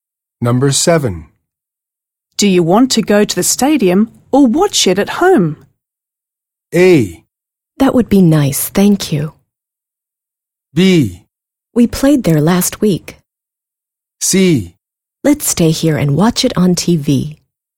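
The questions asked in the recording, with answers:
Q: Do you want to go to the stadium or watch it at home?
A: C: Let's stay here and watch it on TV.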